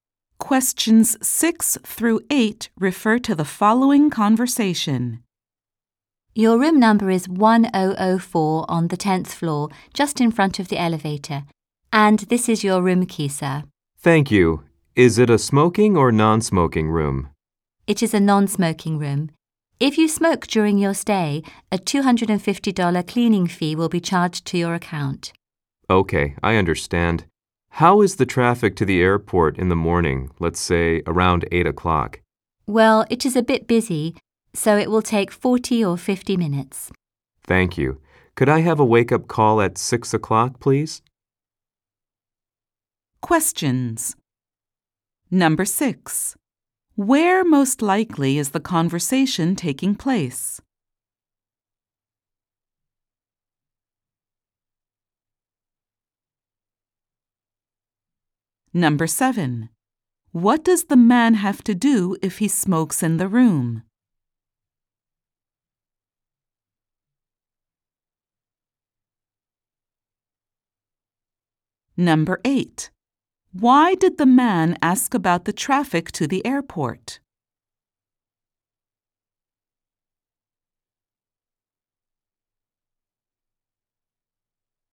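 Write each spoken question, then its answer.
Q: Where most likely is the conversation taking place?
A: At a hotel (front desk)

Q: What does the man have to do if he smokes in the room?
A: Pay a $250 cleaning fee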